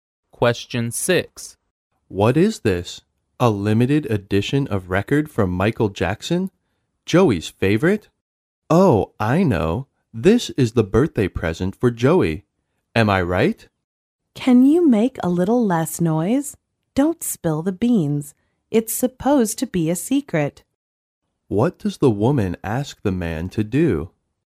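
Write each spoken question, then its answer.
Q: What does the woman ask the man to do?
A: Keep the present a secret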